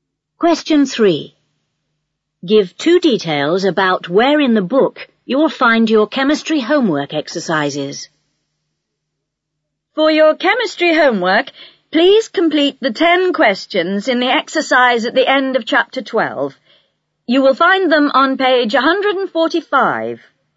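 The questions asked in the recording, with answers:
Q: Give 2 details about where in the book you will find your chemistry homework exercises.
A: At the end of chapter 12, on page 145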